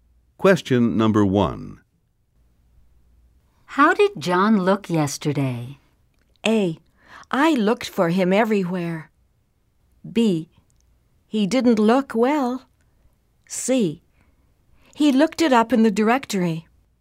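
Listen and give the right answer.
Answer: B: He didn't look well.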